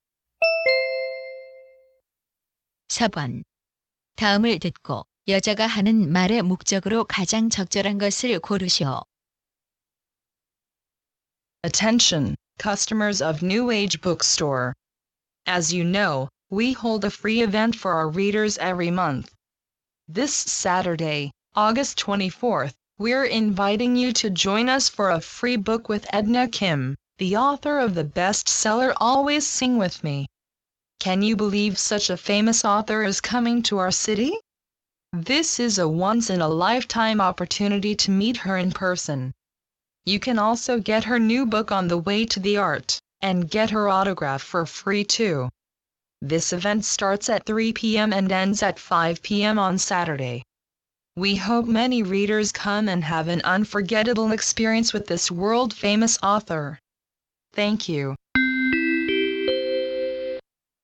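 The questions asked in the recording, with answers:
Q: 다음을 듣고 여자가 하는 말의 목적으로 가장 적절한 것을 고르시오.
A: 유명 작가 Edna Kim과의 무료 행사를 안내하려고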